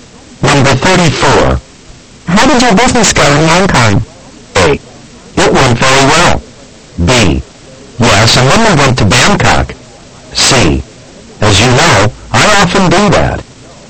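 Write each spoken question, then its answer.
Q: How did your business go in Hong Kong?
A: A: It went very well.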